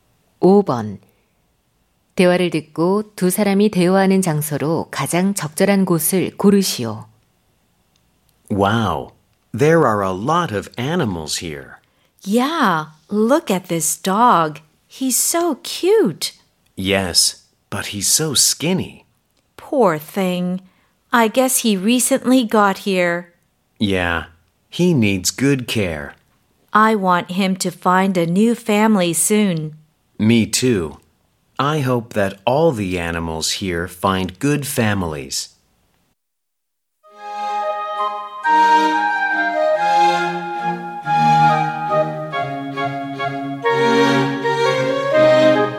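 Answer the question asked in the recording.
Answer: 동물 보호소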